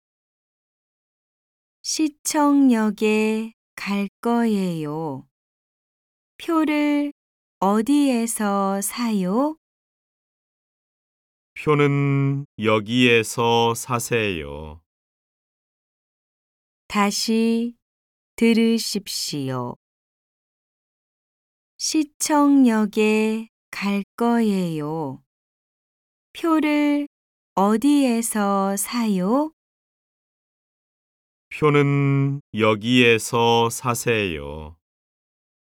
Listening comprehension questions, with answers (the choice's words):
CÂU 5. Địa điểm này là đâu? Hãy chọn một địa điểm thích hợp:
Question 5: Địa điểm này là đâu? Hãy chọn một địa điểm thích hợp:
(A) 학교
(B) 공원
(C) 우체국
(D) 지하철역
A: 지하철역